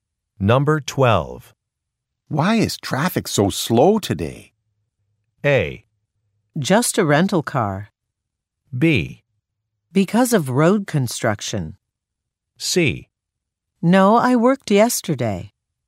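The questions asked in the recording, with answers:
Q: Why is traffic so slow today?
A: B: Because of road construction.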